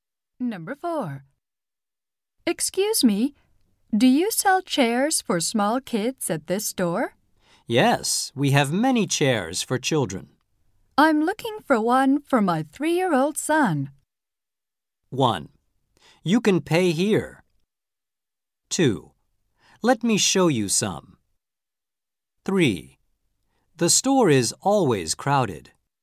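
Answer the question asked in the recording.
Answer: 2: Let me show you some.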